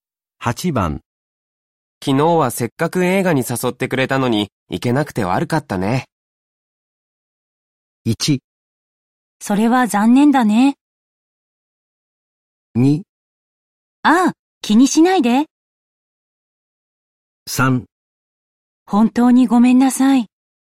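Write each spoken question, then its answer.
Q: 昨日はせっかく映画に誘ってくれたのに、行けなくて悪かったね。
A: 2: ああ、気にしないで。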